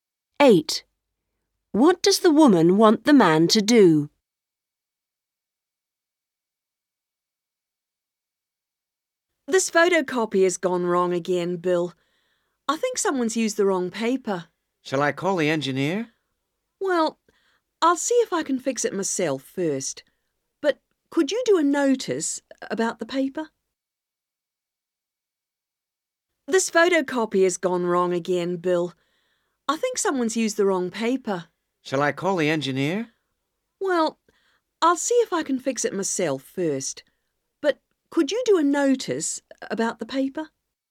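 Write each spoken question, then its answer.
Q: What does the woman want the man to do?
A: Write a notice about the paper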